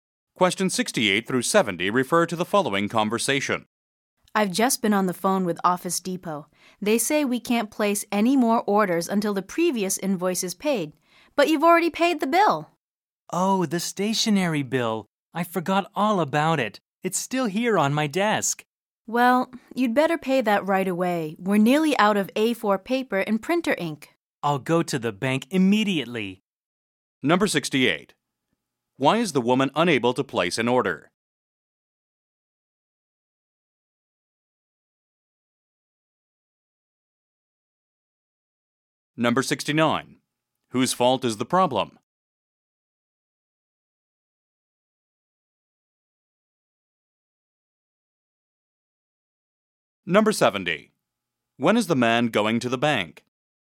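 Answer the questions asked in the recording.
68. The previous invoice hasn't been paid
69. The man's, because he forgot to pay the bill
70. Immediately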